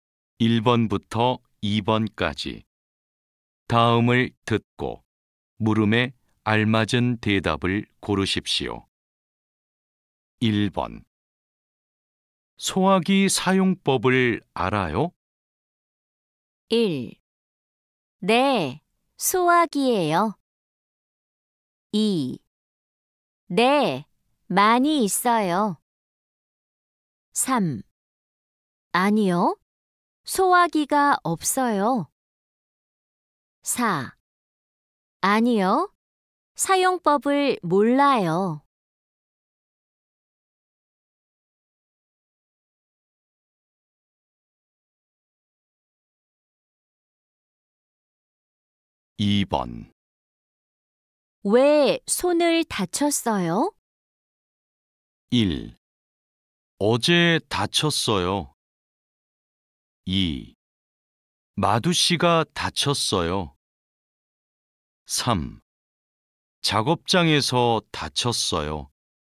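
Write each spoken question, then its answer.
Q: 소화기 사용법을 알아요?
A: 4: 아니요, 사용법을 몰라요.

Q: 왜 손을 다쳤어요?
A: 4: 파편이 튀어서 다쳤어요.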